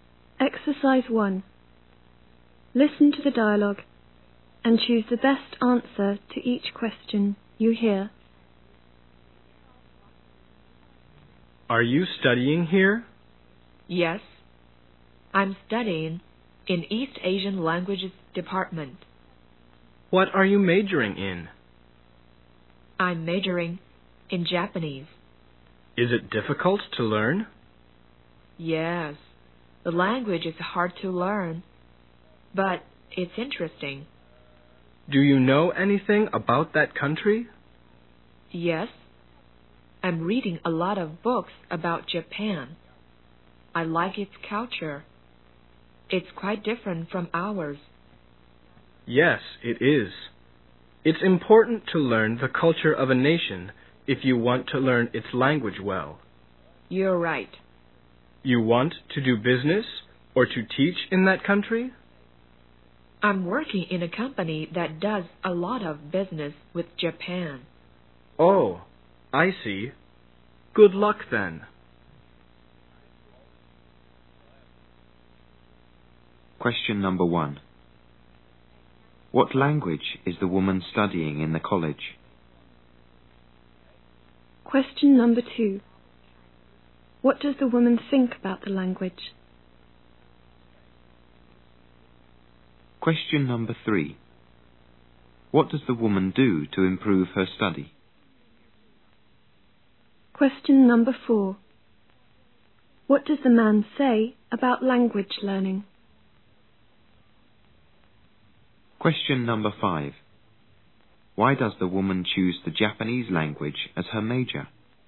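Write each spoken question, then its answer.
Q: What language is the woman studying in the college?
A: Japanese

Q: What does the woman think about the language?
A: It is hard to learn but interesting

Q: What does the woman do to improve her study?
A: She reads a lot of books about Japan

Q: What does the man say about language learning?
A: It's important to learn the culture of a nation to learn its language well

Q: Why does the woman choose the Japanese language as her major?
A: She works in a company that does a lot of business with Japan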